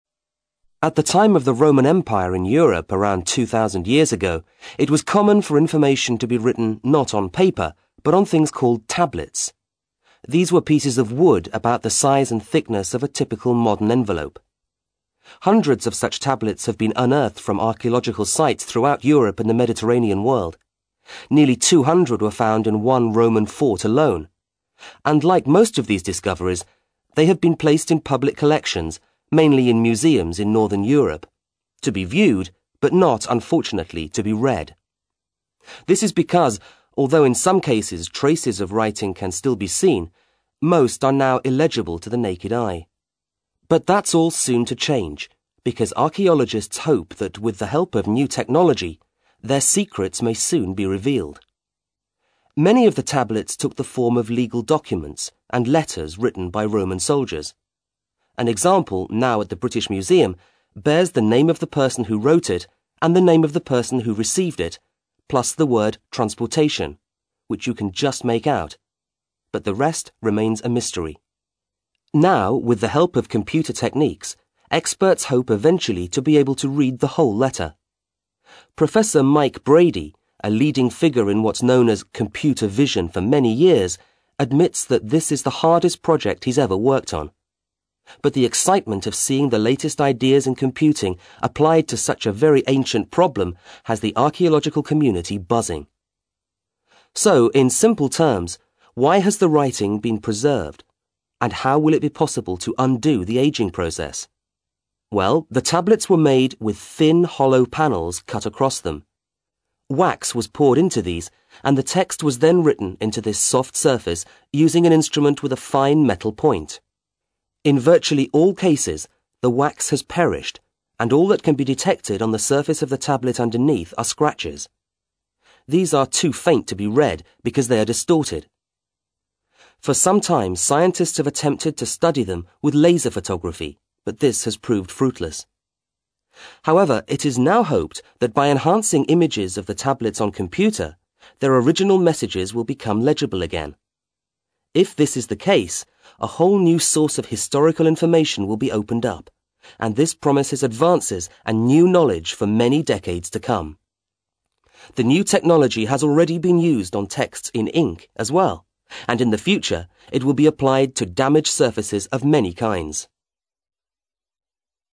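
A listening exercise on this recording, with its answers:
ACTIVITY 146: You will hear a short radio report about how technology is helping archaelogists who want to learn more about some texts written over 2,000 years ago known as Roman tablets. After listening complete the blank spaces in the sentences below. Then check the audio transcription and the correct answers.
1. The speaker says that an Ancient Roman tablet" was about as thick as a present-day .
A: envelope

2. At the site of an old , archaeologists discovered about 200 tablets.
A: Roman fort

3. Roman soldiers often used tablets when writing letters or documents of a nature.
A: legal

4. On one tablet mentioned, the word is legible as well as people's names.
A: transportation

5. An expert in what's called says that the project is very challenging.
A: computer vision

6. Panels on the tablets were once filled with , which provided the writing surface.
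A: wax

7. Efforts to analyse the original texts using photography were unsuccessful.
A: laser

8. New technology is also being applied to other historical texts which were written using .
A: ink

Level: CAE Certificate in Advanced English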